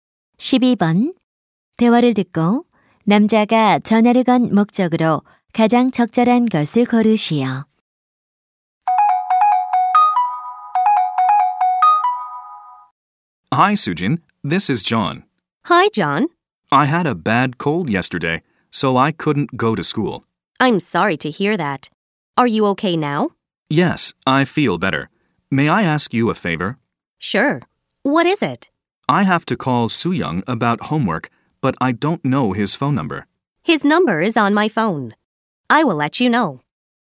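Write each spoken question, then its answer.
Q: 대화를 듣고 남자가 전화를 건 목적으로 가장 적절한 것을 고르시오.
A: 수영이의 전화번호를 물어보려고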